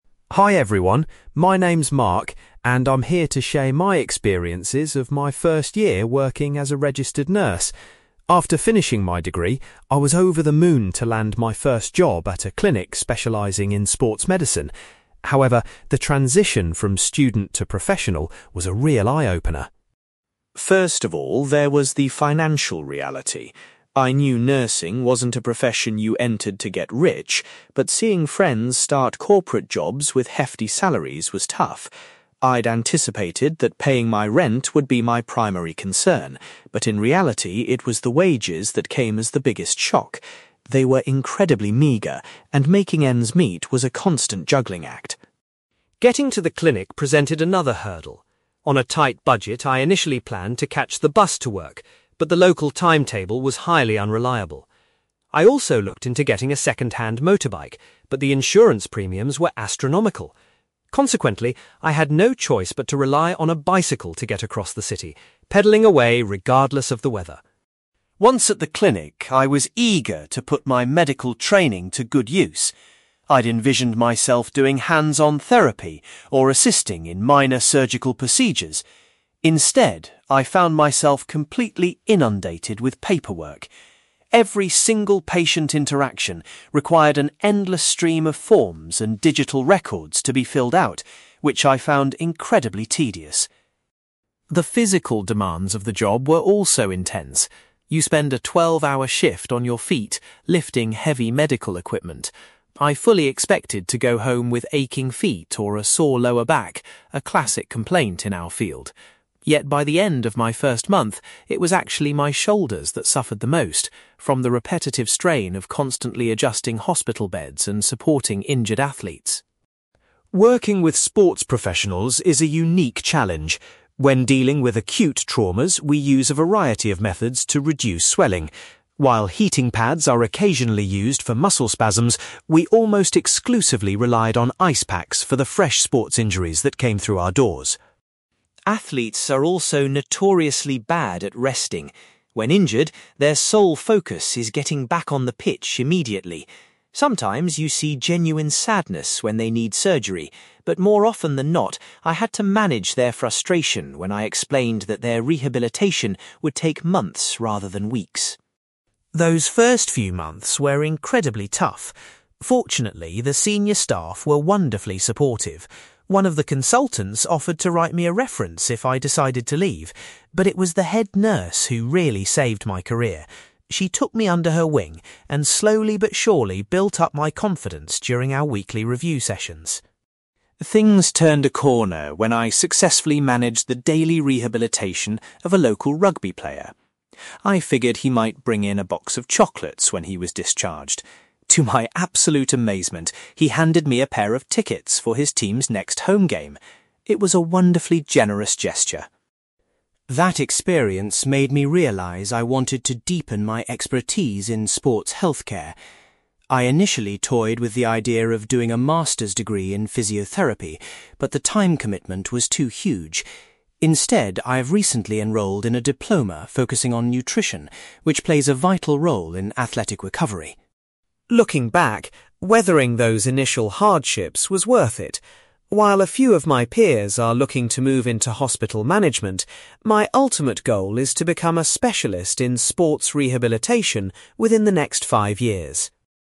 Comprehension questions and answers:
You will hear a young man called Mark giving a presentation about his early career experiences as a newly qualified nurse. For questions 9-18, complete the sentences with a word or short phrase.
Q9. Mark was particularly surprised by the meager (9)........................... he received when he first started working.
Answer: wages

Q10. Because other forms of transport were unsuitable or too expensive, Mark used a (10)........................... to commute to the clinic.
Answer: bicycle

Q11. Mark felt overwhelmed by the amount of (11)........................... he was required to do instead of hands-on therapy.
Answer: paperwork

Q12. Mark experienced the greatest amount of physical pain in his (12)........................... after a long shift.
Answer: shoulders

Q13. In order to treat acute injuries and reduce swelling, Mark frequently applied (13)........................... to patients.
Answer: ice packs

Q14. Mark often had to deal with the athletes' (14)........................... when discussing their long recovery times.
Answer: frustration

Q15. A senior colleague played a vital role in developing Mark's (15)........................... so that he wouldn't quit.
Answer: confidence

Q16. As a reward for his hard work, a grateful rugby player gave Mark some (16)........................... .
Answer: tickets

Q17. Mark has decided to take a course in (17)........................... to further his knowledge of athletic recovery.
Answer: nutrition

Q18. Mark's long-term career ambition is to work as a (18)........................... in the field of sports healthcare.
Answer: specialist

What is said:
Mark: Hi everyone, my name is Mark, and I'm here to share my experiences of my first year working as a registered nurse. After finishing my degree, I was over the moon to land my first job at a clinic specializing in sports medicine. However, the transition from student to professional was a real eye-opener.
First of all, there was the financial reality. I knew nursing wasn't a profession you entered to get rich, but seeing friends start corporate jobs with hefty salaries was tough. I'd anticipated that paying my rent would be my primary concern, but in reality, it was the wages that came as the biggest shock. They were incredibly meager, and making ends meet was a constant juggling act.
Getting to the clinic presented another hurdle. On a tight budget, I initially planned to catch the bus to work, but the local timetable was highly unreliable. I also looked into getting a second-hand motorbike, but the insurance premiums were astronomical. Consequently, I had no choice but to rely on a bicycle to get across the city, pedalling away regardless of the weather.
Once at the clinic, I was eager to put my medical training to good use. I'd envisioned myself doing hands-on therapy or assisting in minor surgical procedures. Instead, I found myself completely inundated with paperwork. Every single patient interaction required an endless stream of forms and digital records to be filled out, which I found incredibly tedious.
The physical demands of the job were also intense. You spend a twelve-hour shift on your feet, lifting heavy medical equipment. I fully expected to go home with aching feet or a sore lower back, a classic complaint in our field. Yet, by the end of my first month, it was actually my shoulders that suffered the most, from the repetitive strain of constantly adjusting hospital beds and supporting injured athletes.
Working with sports professionals is a unique challenge. When dealing with acute traumas, we use a variety of methods to reduce swelling. While heating pads are occasionally used for muscle spasms, we almost exclusively relied on ice packs for the fresh sports injuries that came through our doors.
Athletes are also notoriously bad at resting. When injured, their sole focus is getting back on the pitch immediately. Sometimes you see genuine sadness when they need surgery, but more often than not, I had to manage their frustration when I explained that their rehabilitation would take months rather than weeks.
Those first few months were incredibly tough. Fortunately, the senior staff were wonderfully supportive. One of the consultants offered to write me a reference if I decided to leave, but it was the head nurse who really saved my career. She took me under her wing, and slowly but surely built up my confidence during our weekly review sessions.
Things turned a corner when I successfully managed the daily rehabilitation of a local rugby player. I figured he might bring in a box of chocolates when he was discharged. To my absolute amazement, he handed me a pair of tickets for his team's next home game. It was a wonderfully generous gesture.
That experience made me realize I wanted to deepen my expertise in sports healthcare. I initially toyed with the idea of doing a master's degree in physiotherapy, but the time commitment was too huge. Instead, I've recently enrolled in a diploma focusing on nutrition, which plays a vital role in athletic recovery.
Looking back, weathering those initial hardships was worth it. While a few of my peers are looking to move into hospital management, my ultimate goal is to become a specialist in sports rehabilitation within the next five years.

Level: B2